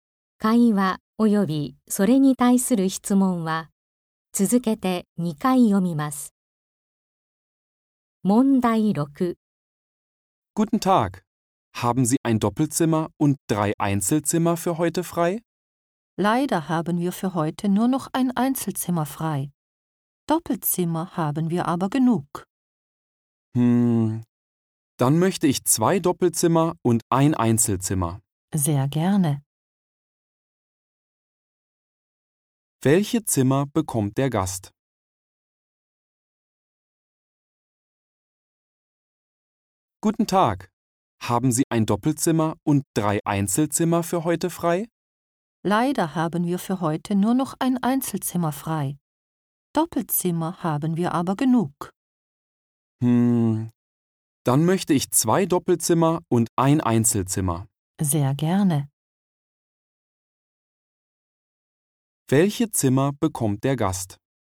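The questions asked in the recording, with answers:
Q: Welche Zimmer bekommt der Gast?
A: Zwei Doppelzimmer und ein Einzelzimmer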